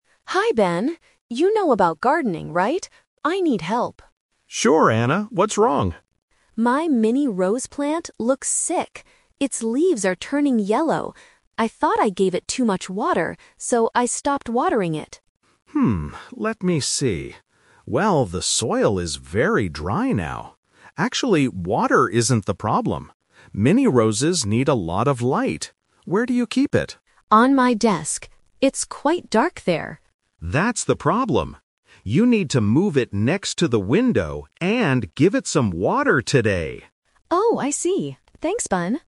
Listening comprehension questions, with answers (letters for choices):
Listen to a conversation between two friends about a plant. Choose the correct answer (A, B, or C).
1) What is the problem with Anna's plant?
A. It has no flowers.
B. Its leaves are turning yellow.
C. It is too big for her desk.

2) Why did Anna stop watering her plant?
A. Because she thought it needed more light.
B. Because she thought she gave it too much water.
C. Because she was away on a holiday.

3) What does Ben tell Anna to do?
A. Move the plant to the window.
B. Keep the plant on her desk.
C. Give the plant less water.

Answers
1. B
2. B
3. A

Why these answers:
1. Anna states the problem clearly at the beginning: "Its leaves are turning yellow."
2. Anna explains her reason: "I thought I gave it too much water, so I stopped watering it."
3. Ben tells her how to fix the problem: "You need to move it next to the window..."

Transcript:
Anna: Hi Ben. You know about gardening, right? I need help.
Ben: Sure, Anna. What's wrong?
Anna: My mini rose plant looks sick. I thought I gave it too much water, so I stopped watering it.
let me see. Well, the soil is very dry now. Actually, water isn't the problem. Mini roses need a lot of light. Where do you keep it?
Anna: On my desk. It's quite dark there.
Ben: That's the problem. You need to move it next to the window, and give it some water today!